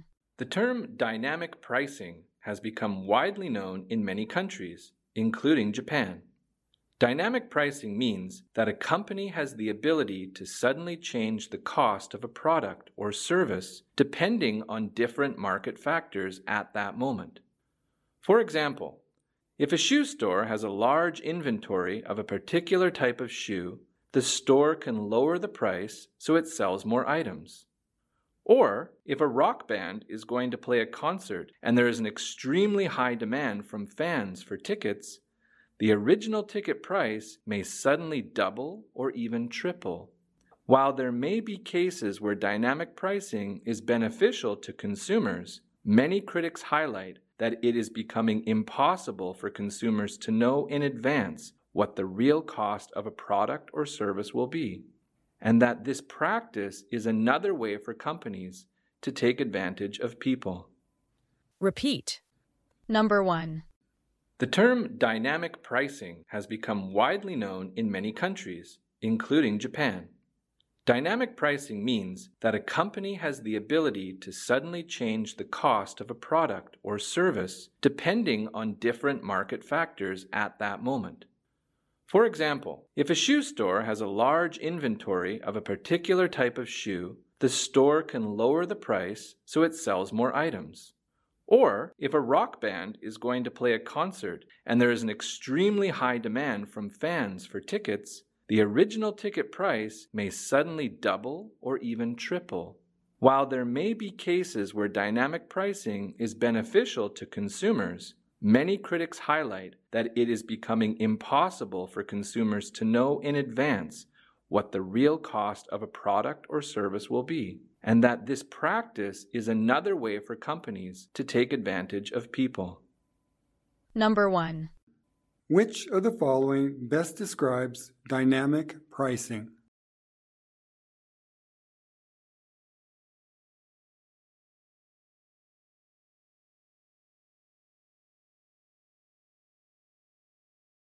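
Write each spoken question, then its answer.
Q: Which of the following best describes dynamic pricing?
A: A company suddenly changing the price of a product or service depending on market factors at that moment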